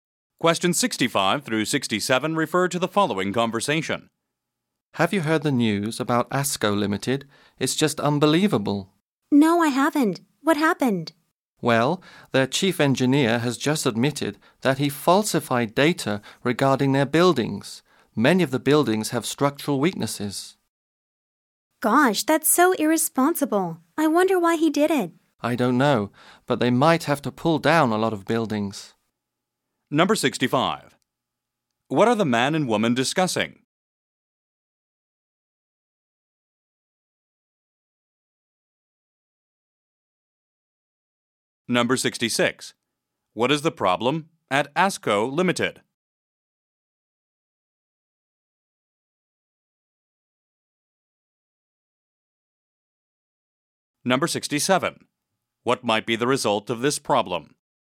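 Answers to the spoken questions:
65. News about ASCO Limited
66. Its chief engineer falsified data about its buildings
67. Many buildings might have to be pulled down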